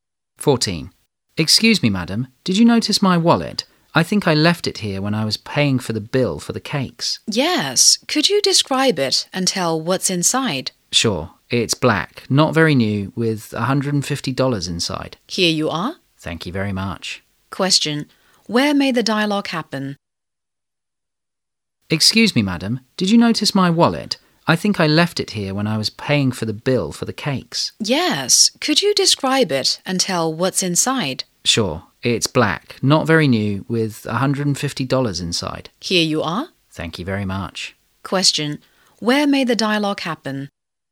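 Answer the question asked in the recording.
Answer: In a cake shop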